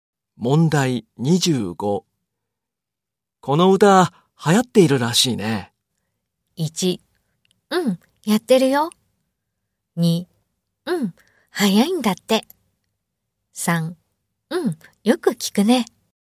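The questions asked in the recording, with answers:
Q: この歌流行っているらしいね。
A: 3: うん、よく聞くね。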